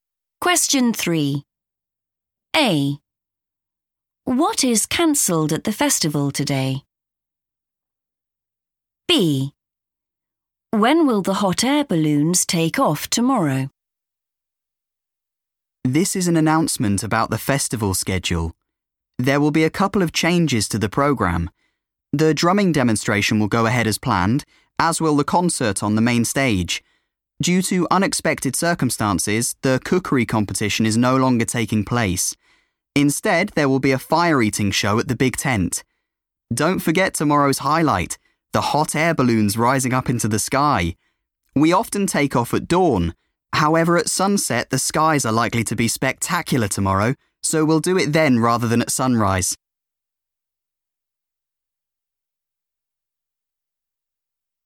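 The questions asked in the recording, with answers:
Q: What is cancelled at the festival today?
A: the cookery competition

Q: When will the hot air balloons take off tomorrow?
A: at sunset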